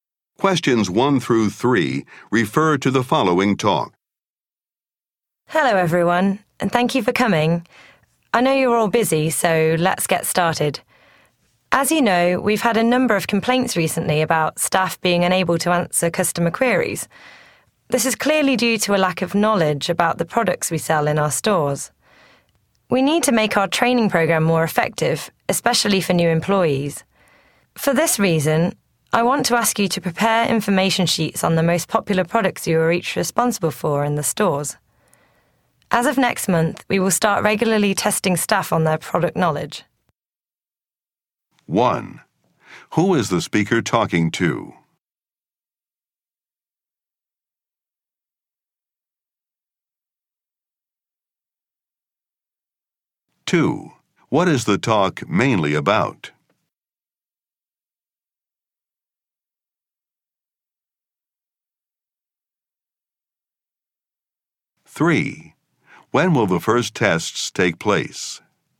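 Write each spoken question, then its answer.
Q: What is the talk mainly about?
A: Improving staff training on product knowledge

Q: When will the first tests take place?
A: Next month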